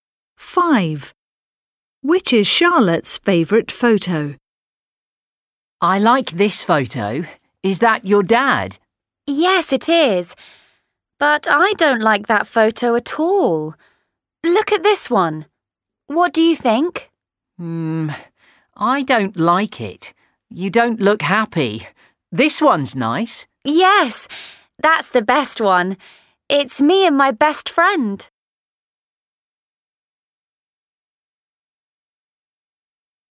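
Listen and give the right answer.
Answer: The photo of her and her best friend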